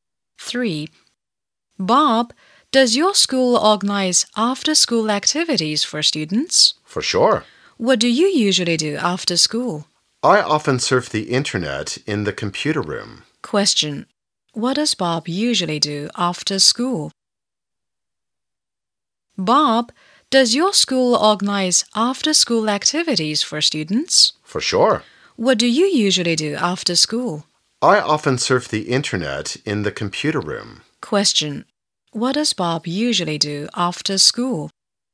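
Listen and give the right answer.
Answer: He surfs the internet in the computer room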